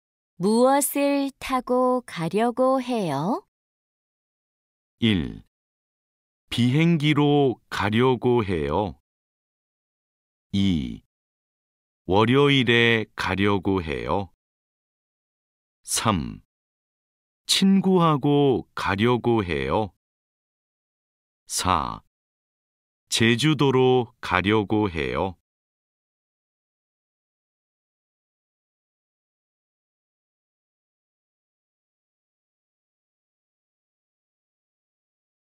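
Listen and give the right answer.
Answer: 1: 비행기로 가려고 해요.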